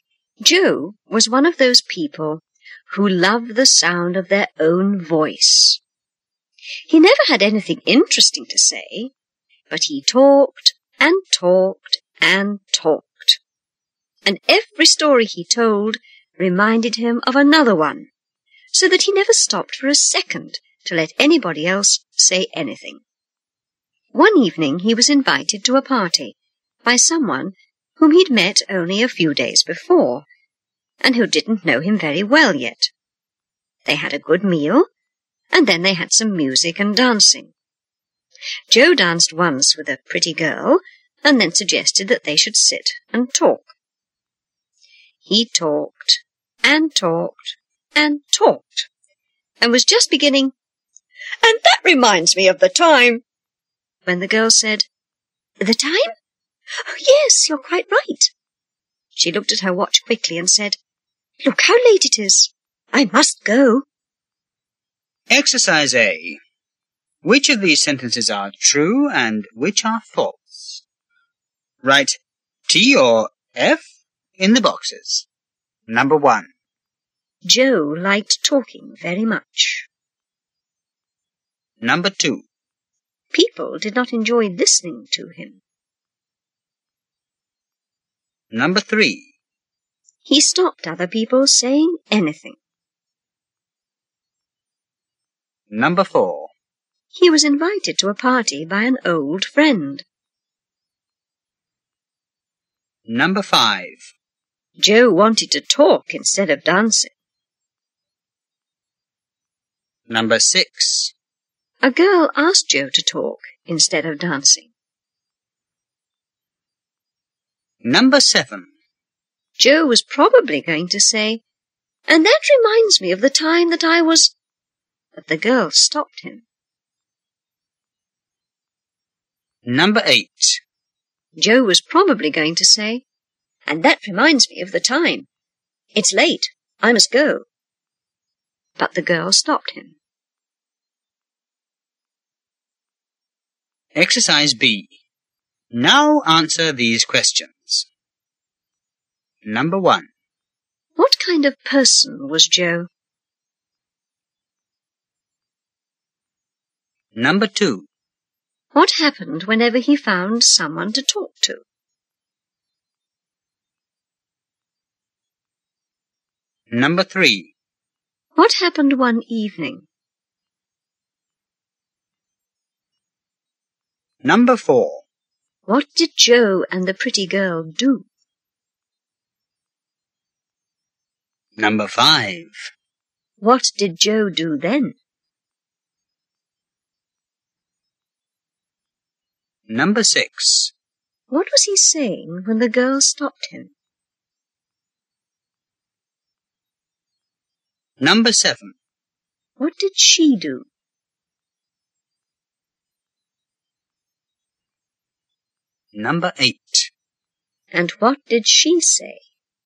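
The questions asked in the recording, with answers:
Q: Joe liked talking very much.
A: True

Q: He stopped other people saying anything.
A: True

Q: He was invited to a party by an old friend.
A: False

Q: Joe wanted to talk instead of dancing.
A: True

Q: A girl asked Joe to talk instead of dancing.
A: False

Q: Joe was probably going to say, "And that reminds me of the time that I was..." But the girl stopped him.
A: True

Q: Joe was probably going to say, "And that reminds me of the time.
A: False

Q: What kind of person was Joe?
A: One who loved the sound of his own voice and talked all the time

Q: What happened whenever he found someone to talk to?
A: He talked and talked and never let them say anything

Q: What happened one evening?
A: He was invited to a party by someone he had only just met

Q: What did Joe and the pretty girl do?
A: They danced once

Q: What did Joe do then?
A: He suggested they sit and talk, and talked and talked

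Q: What was he saying when the girl stopped him?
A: "And that reminds me of the time"

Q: What did she do?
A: She looked at her watch quickly

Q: And what did she say?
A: "Look how late it is. I must go."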